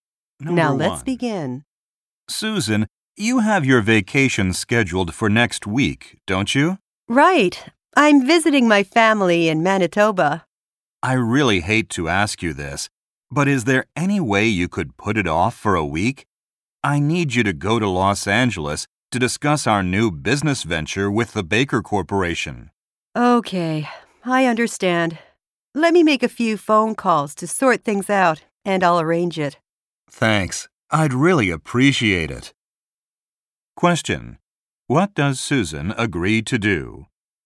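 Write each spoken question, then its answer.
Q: What does Susan agree to do?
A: Put off her vacation for a week to go to Los Angeles.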